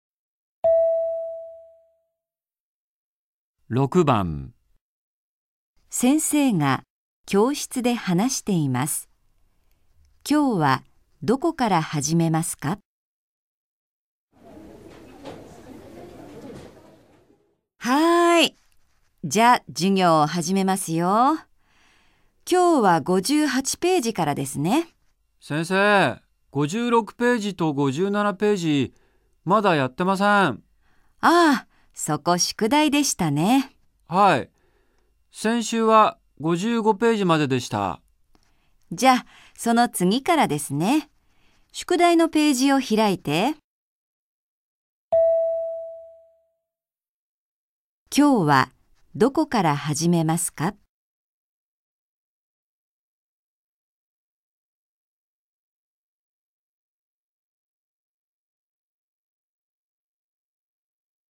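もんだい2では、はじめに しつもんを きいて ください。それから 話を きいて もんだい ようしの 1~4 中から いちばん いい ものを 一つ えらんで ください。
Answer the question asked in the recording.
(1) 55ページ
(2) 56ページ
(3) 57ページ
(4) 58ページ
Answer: (2) 56ページ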